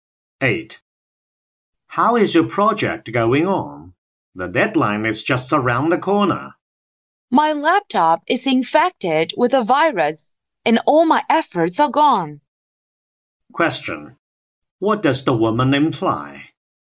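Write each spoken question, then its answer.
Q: What does the woman imply?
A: She may not finish the project by the deadline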